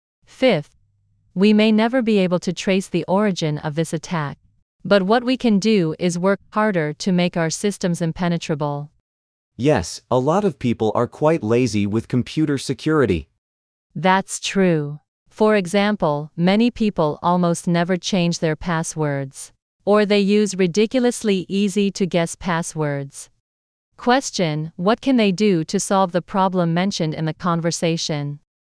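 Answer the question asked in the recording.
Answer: Work harder to make their computer systems impenetrable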